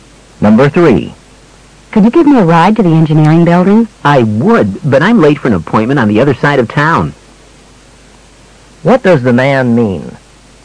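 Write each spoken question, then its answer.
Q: What does the man mean?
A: He can't give her a ride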